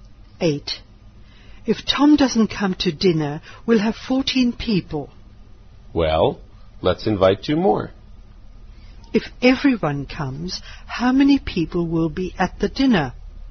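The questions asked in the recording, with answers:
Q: If everyone comes, how many people will be at the dinner?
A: 17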